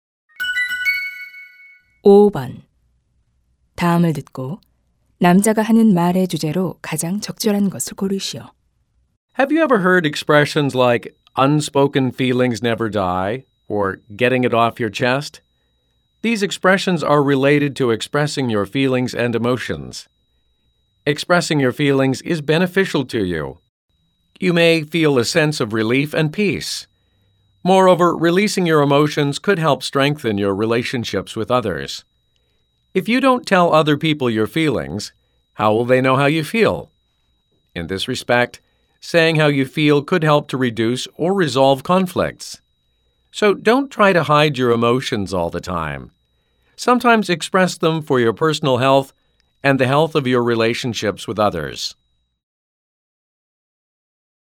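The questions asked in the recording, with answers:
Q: 다음을 듣고 남자가 하는 말의 주제로 가장 적절한 것을 고르시오.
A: 감정 표현의 이점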